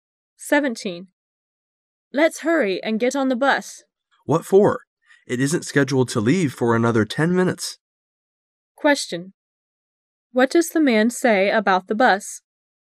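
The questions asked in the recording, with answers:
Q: What does the man say about the bus?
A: It won't leave for another 10 minutes, so there's no need to hurry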